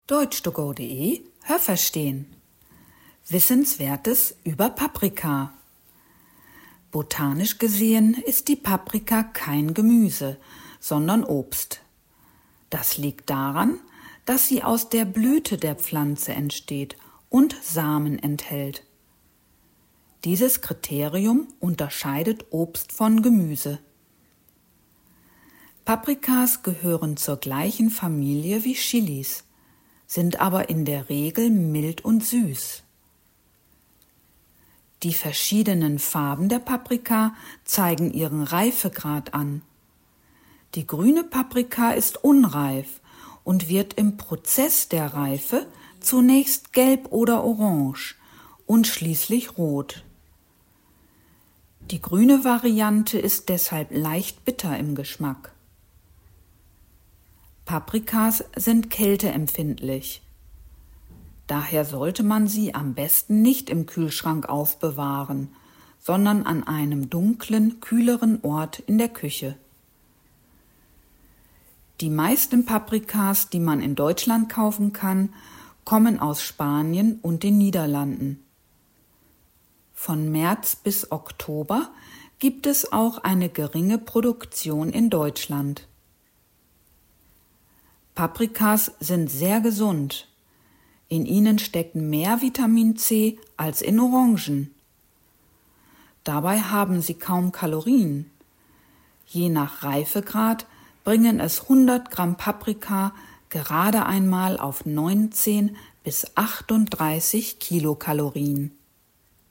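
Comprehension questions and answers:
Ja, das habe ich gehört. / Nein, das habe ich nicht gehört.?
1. Die Paprika gehört botanisch zum Gemüse. Haben Sie das gehört? Stimmt diese Aussage?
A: Nein, das habe ich nicht gehört.

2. Paprikas gehören zur gleichen Familie wie Chilis. Haben Sie das gehört? Stimmt diese Aussage?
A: Ja, das habe ich gehört.

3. Meist sind Paprikas mild und süß, anders als Chilis. Haben Sie das gehört? Stimmt diese Aussage?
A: Ja, das habe ich gehört.

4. Die verschiedenen Farben der Paprika zeigen an, aus welchem Land sie kommt. Haben Sie das gehört? Stimmt diese Aussage?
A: Nein, das habe ich nicht gehört.

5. Die grüne Paprika ist besonders süß. Haben Sie das gehört? Stimmt diese Aussage?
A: Nein, das habe ich nicht gehört.

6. Da die Paprika kälteempfindlich ist, sollte man sie nicht im Kühlschrank aufbewahren. Haben Sie das gehört? Stimmt diese Aussage?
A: Ja, das habe ich gehört.

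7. Zwischen März und Oktober gibt es auch eine geringe Paprikaproduktion in Deutschland. Haben Sie das gehört? Stimmt diese Aussage?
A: Ja, das habe ich gehört.

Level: A2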